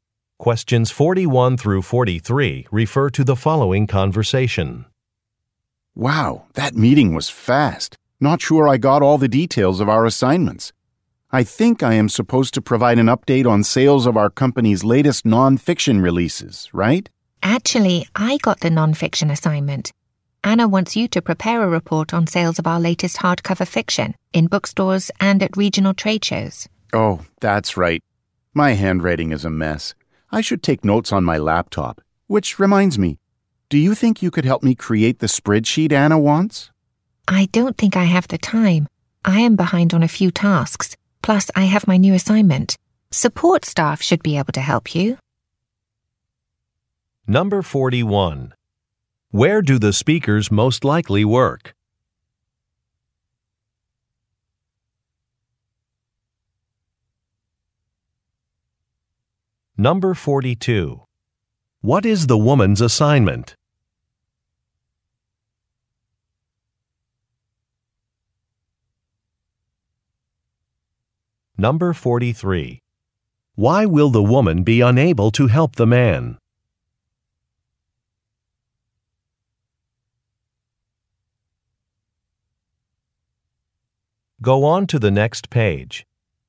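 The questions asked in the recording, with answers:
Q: Where do the speakers most likely work?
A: At a book publisher

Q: What is the woman's assignment?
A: An update on sales of the latest non-fiction releases

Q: Why will the woman be unable to help the man?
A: She is behind on some tasks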